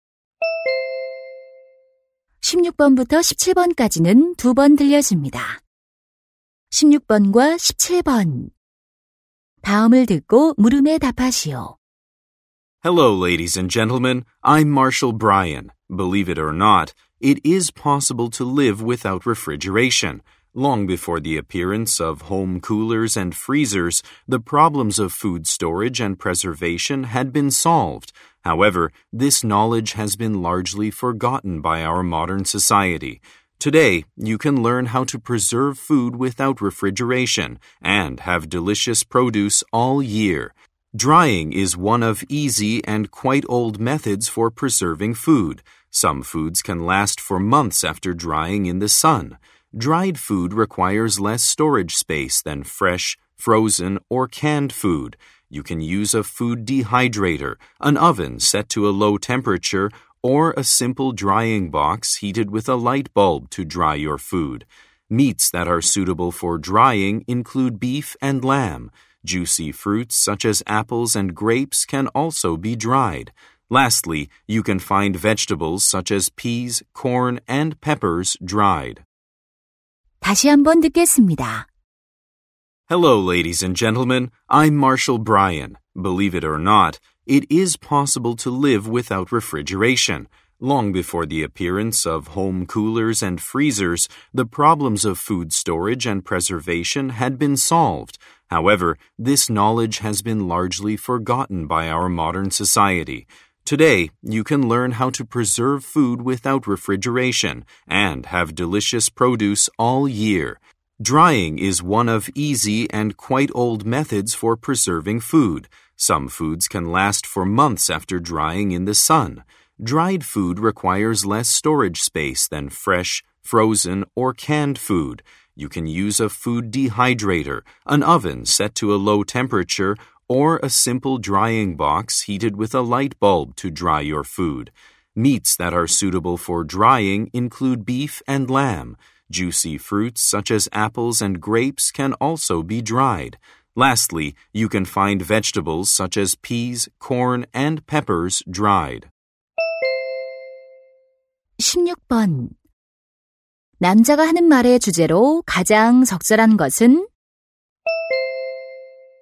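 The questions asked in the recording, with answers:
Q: 남자가 하는 말의 주제로 가장 적절한 것은?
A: 냉장고 없이 음식을 건조해 보존하는 방법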